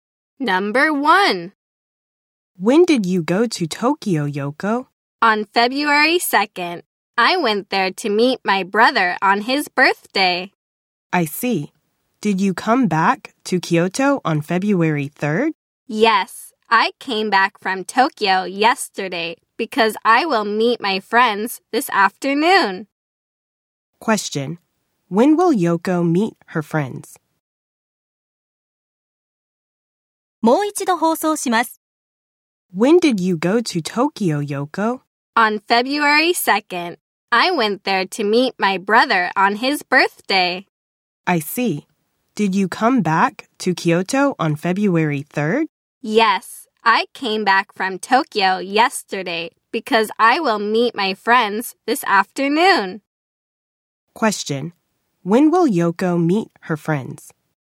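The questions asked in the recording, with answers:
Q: When will Yoko meet her friends?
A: This afternoon (February 4th)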